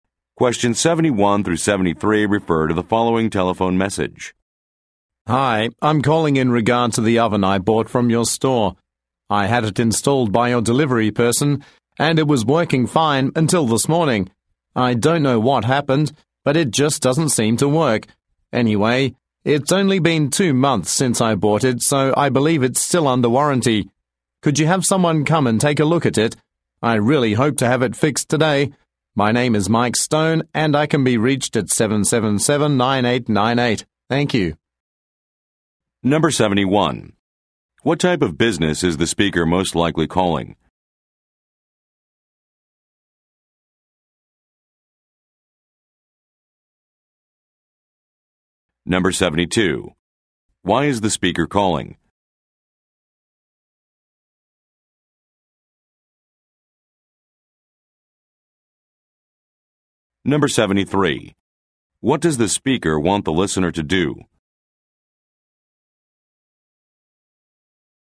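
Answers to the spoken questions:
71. An appliance store that sold him an oven
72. His oven stopped working
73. Send someone to repair the oven today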